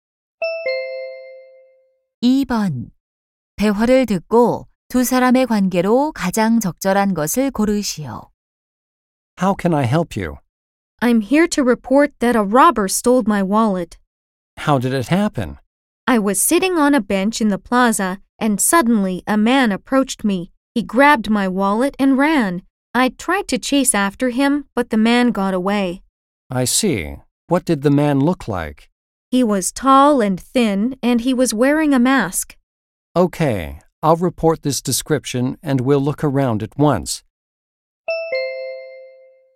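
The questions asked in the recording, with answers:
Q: 대화를 듣고 두 사람의 관계로 가장 적절한 것을 고르시오.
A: 경찰관과 피해자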